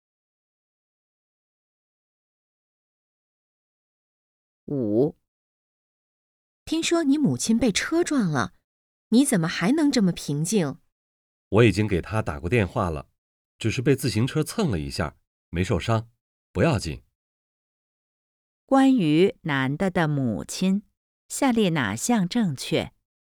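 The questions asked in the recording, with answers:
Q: 关于男的的母亲,下列哪项正确?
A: 只是被自行车蹭了一下,没受伤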